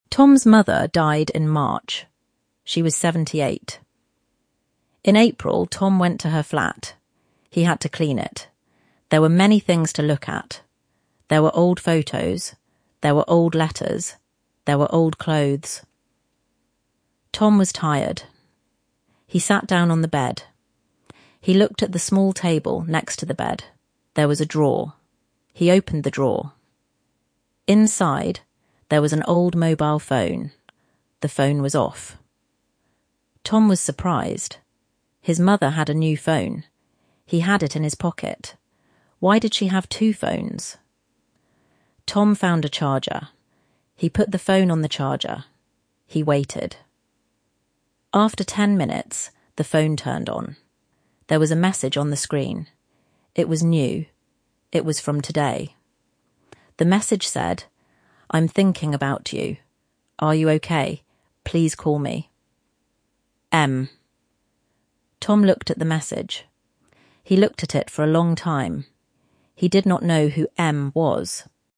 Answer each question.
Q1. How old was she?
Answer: Seventy-eight.

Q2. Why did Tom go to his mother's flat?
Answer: He had to clean it.

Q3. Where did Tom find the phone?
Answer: In a drawer in the small table next to the bed.

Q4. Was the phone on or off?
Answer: It was off.

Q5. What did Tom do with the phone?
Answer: He found a charger and put the phone on the charger. He waited.

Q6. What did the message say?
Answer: 'I am thinking about you. Are you OK? Please call me. M.'

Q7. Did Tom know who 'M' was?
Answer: No, he did not know.

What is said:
Tom's mother died in March. She was seventy-eight.
In April, Tom went to her flat. He had to clean it. There were many things to look at. There were old photos. There were old letters. There were old clothes.
Tom was tired. He sat down on the bed. He looked at the small table next to the bed. There was a drawer.
He opened the drawer. Inside, there was an old mobile phone. The phone was off.
Tom was surprised. His mother had a new phone. He had it in his pocket. Why did she have two phones?
Tom found a charger. He put the phone on the charger. He waited.
After ten minutes, the phone turned on. There was a message on the screen. It was new. It was from today.
The message said
'I am thinking about you. Are you OK? Please call me. M.'